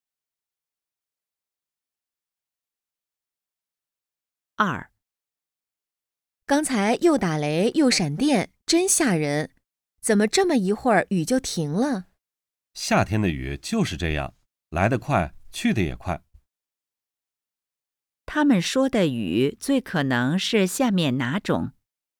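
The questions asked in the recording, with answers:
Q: 他们说的雨最可能是下面哪种?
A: 雷阵雨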